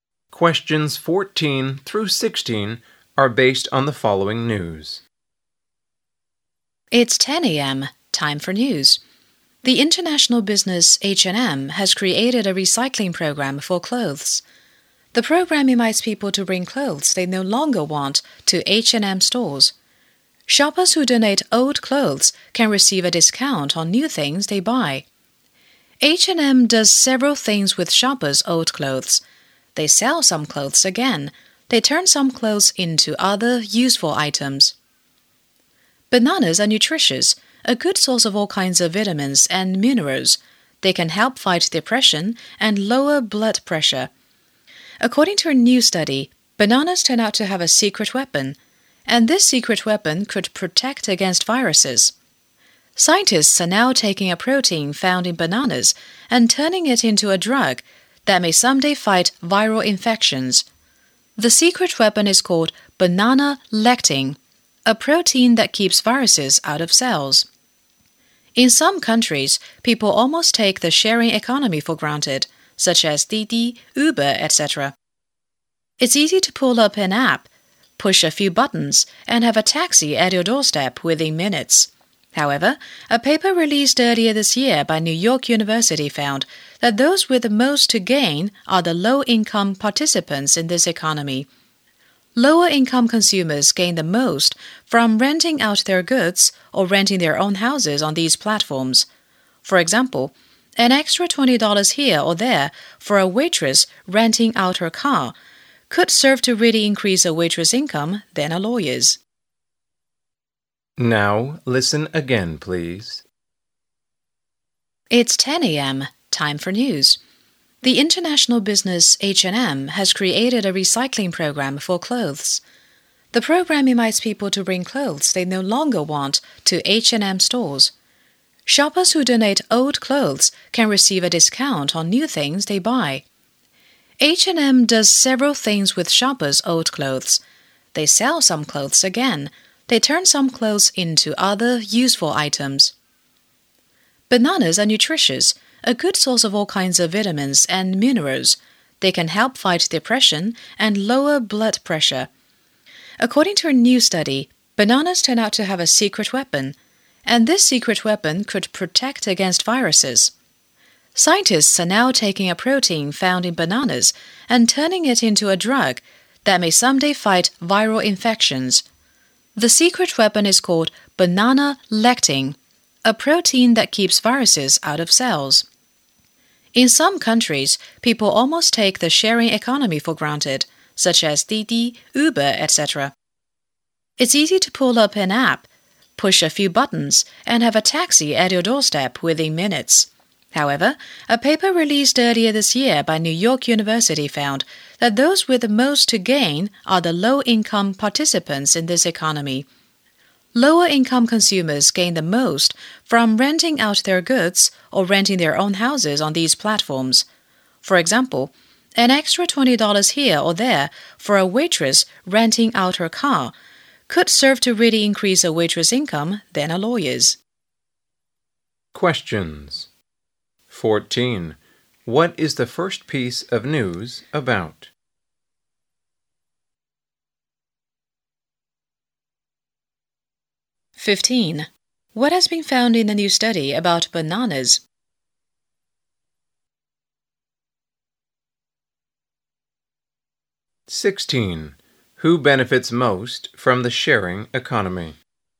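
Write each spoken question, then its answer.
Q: What is the first piece of news about?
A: H&M's clothes recycling program

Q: What has been found in the new study about bananas?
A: A protein in bananas (banana lectin) may protect against viruses

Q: Who benefits most from the sharing economy?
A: Low-income participants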